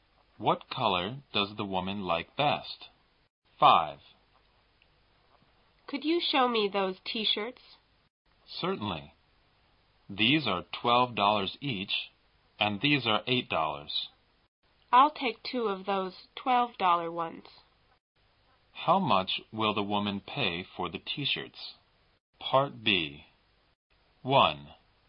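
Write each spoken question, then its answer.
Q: How much will the woman pay for the t-shirts?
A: $24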